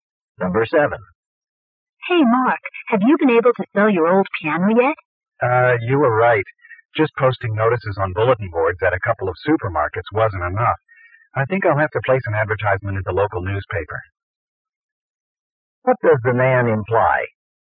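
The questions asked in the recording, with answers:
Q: What does the man imply?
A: He hasn't sold his piano yet.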